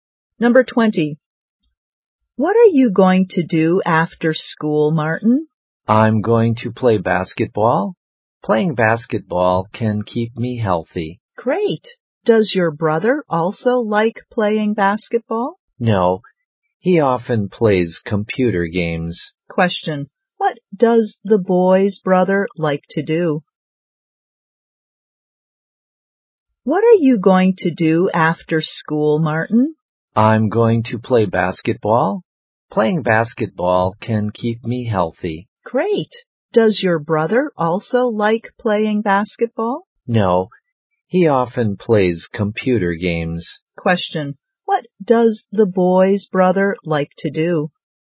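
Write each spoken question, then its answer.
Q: What does the boy's brother like to do?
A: Play computer games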